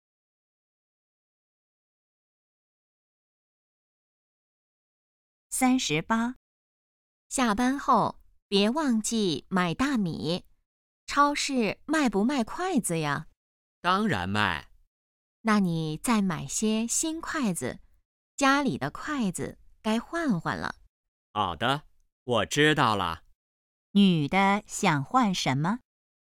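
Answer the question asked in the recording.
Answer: 筷子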